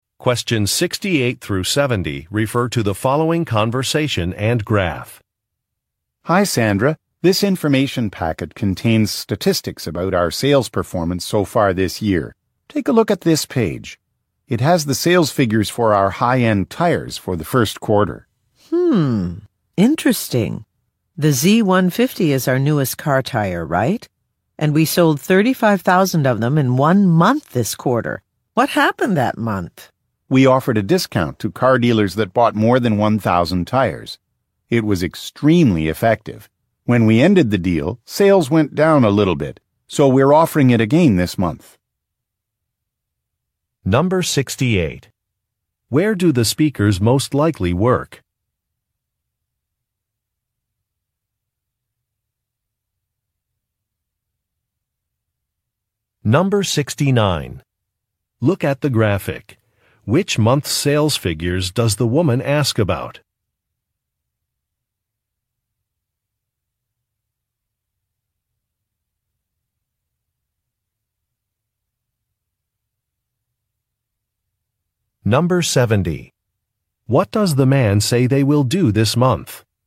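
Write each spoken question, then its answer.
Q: Where do the speakers most likely work?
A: At a tire company

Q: What does the man say they will do this month?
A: Offer the discount to car dealers again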